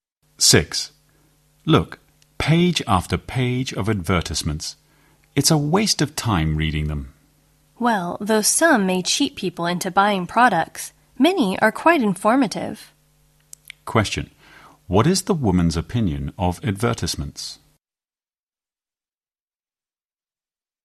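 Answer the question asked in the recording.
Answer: Many of them are quite informative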